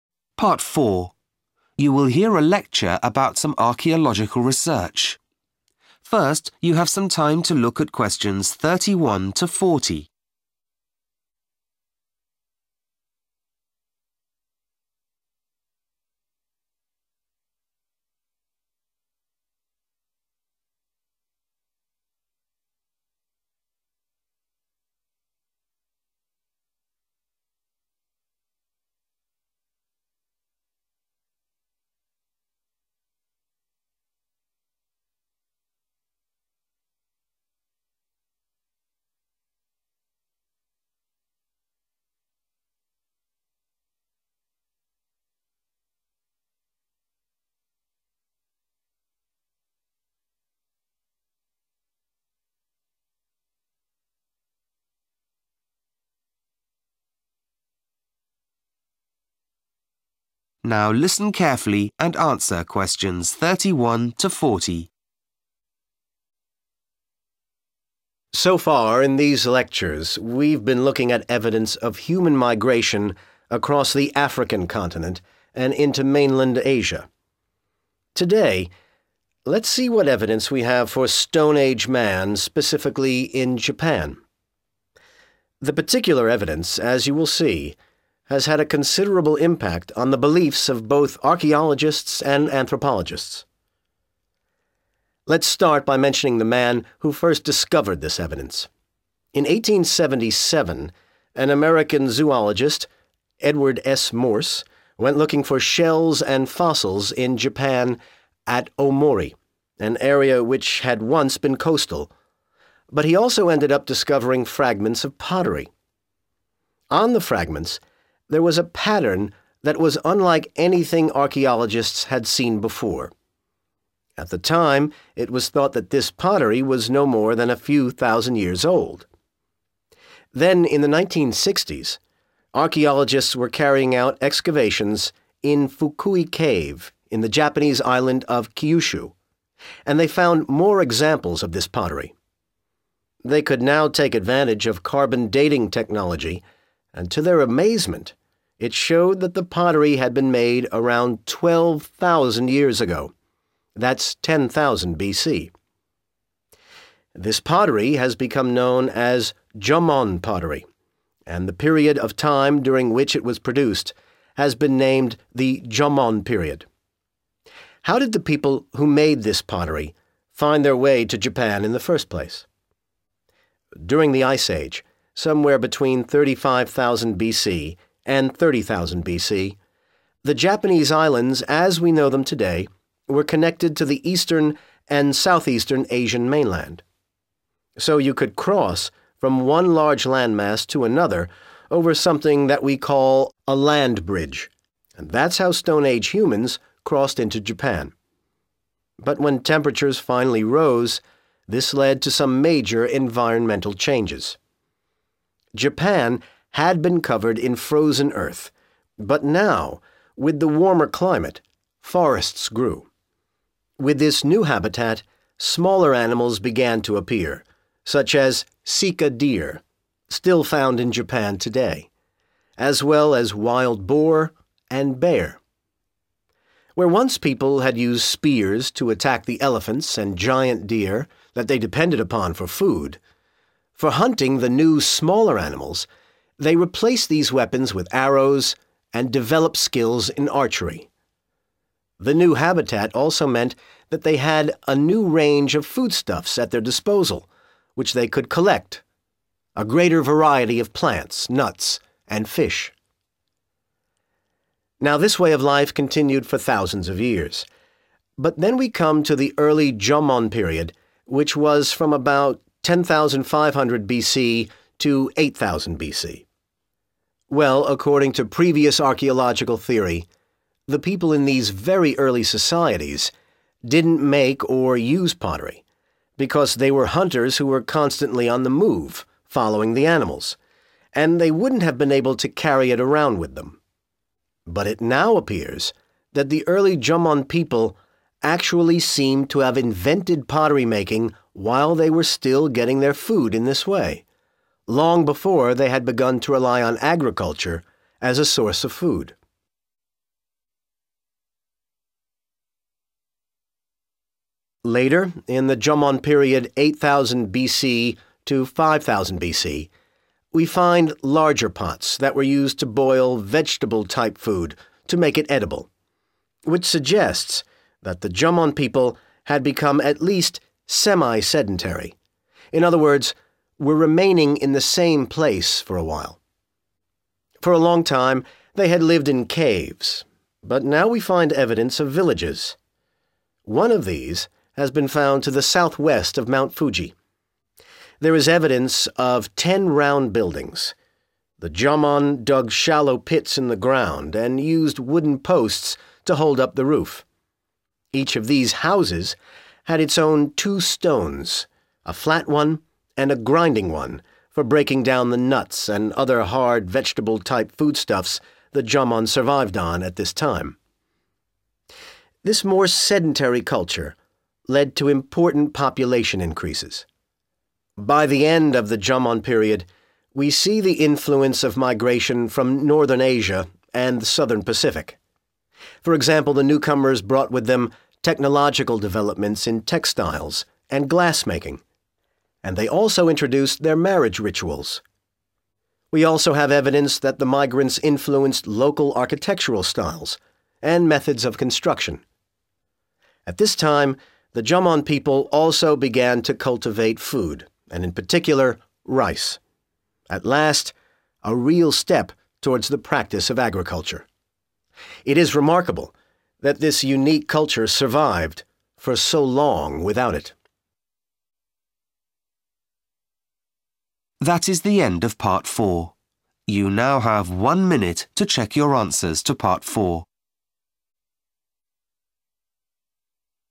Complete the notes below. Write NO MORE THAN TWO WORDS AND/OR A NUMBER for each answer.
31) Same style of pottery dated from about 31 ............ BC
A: 10,000

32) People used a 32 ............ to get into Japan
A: Land bridge

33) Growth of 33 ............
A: forests

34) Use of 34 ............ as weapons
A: arrows

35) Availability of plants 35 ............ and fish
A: nuts

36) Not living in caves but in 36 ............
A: villages

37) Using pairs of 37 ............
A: stones

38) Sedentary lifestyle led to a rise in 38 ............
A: population

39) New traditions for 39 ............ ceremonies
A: marriage

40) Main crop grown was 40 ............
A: rice